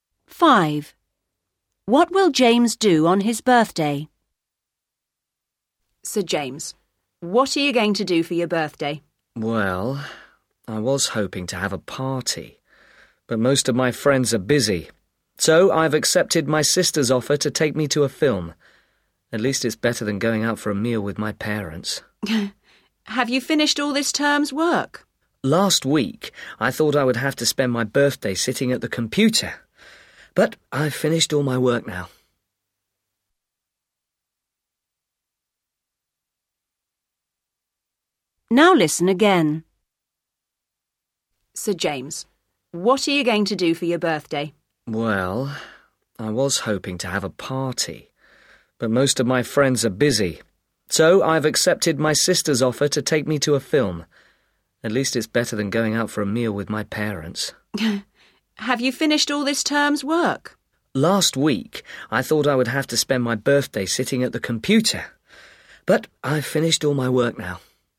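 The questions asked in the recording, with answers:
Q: What will James do on his birthday?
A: Go to see a film with his sister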